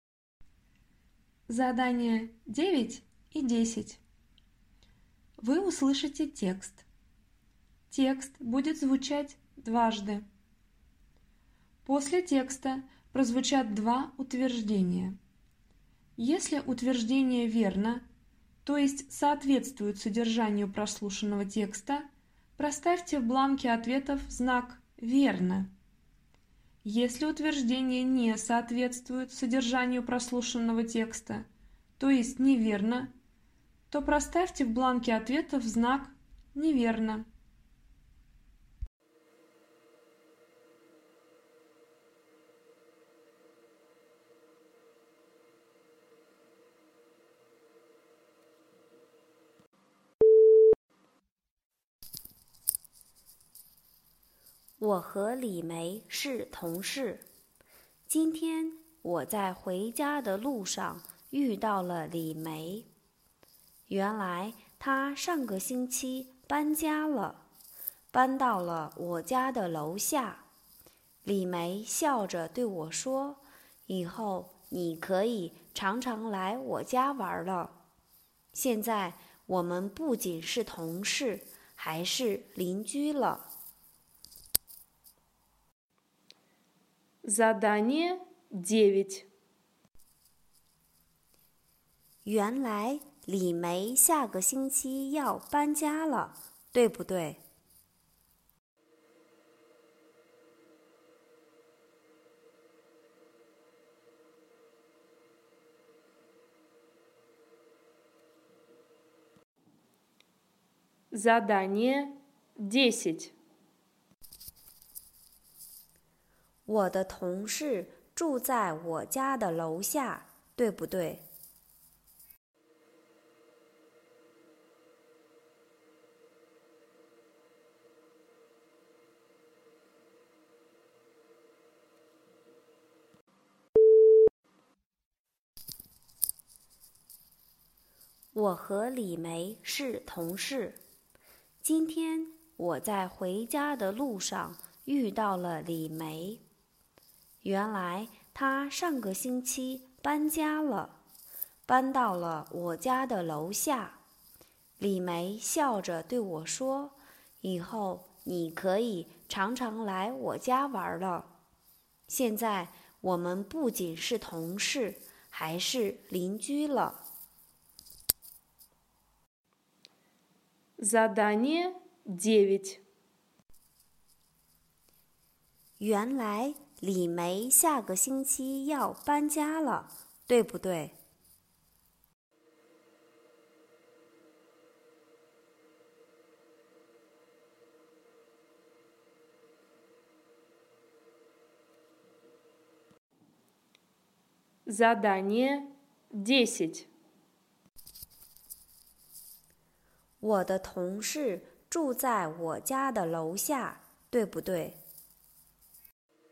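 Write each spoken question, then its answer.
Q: 原来李梅下个星期要搬家了,对不对?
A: 不对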